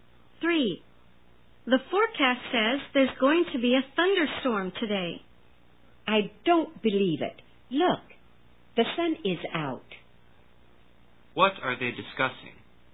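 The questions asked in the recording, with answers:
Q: What are they discussing?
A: The weather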